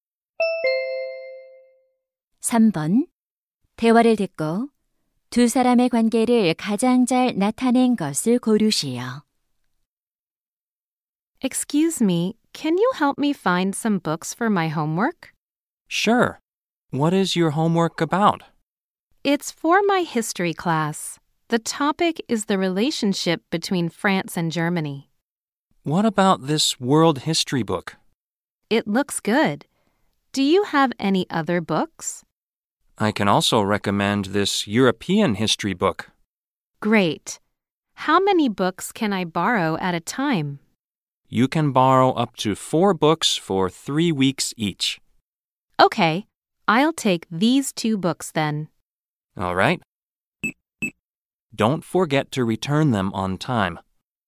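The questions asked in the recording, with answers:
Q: 대화를 듣고 두 사람의 관계를 가장 잘 나타낸 것을 고르시오.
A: 도서관 사서 - 학생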